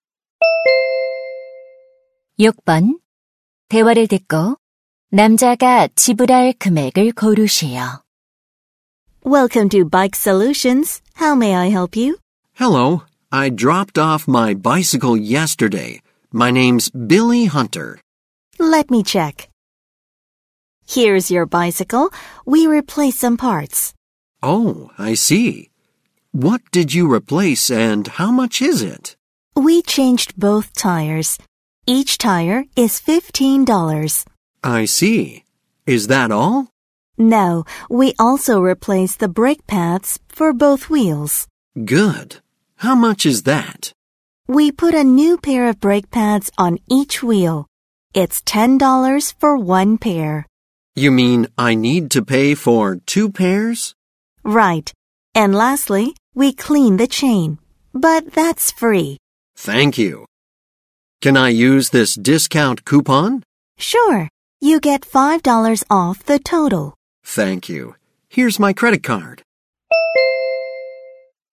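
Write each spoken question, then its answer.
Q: 대화를 듣고 남자가 지불할 금액을 고르시오.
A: $45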